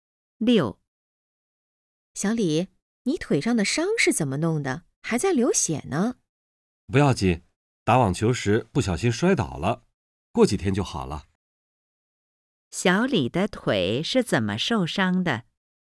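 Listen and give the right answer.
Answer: 打网球时不小心摔倒了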